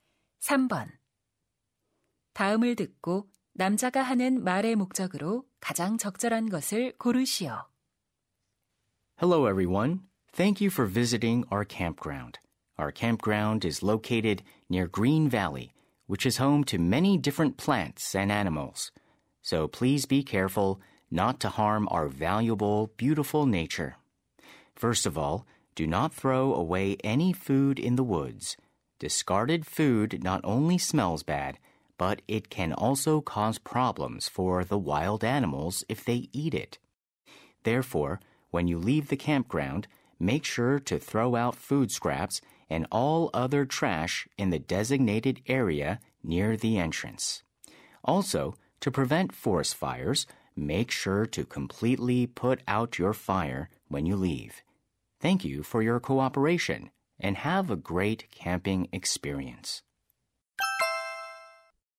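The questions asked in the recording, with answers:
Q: 다음을 듣고 남자가 하는 말의 목적으로 가장 적절한 것을 고르시오.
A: 캠핑장에서 자연을 보호하기 위한 수칙(음식물 쓰레기 처리, 불 끄기)을 당부하려고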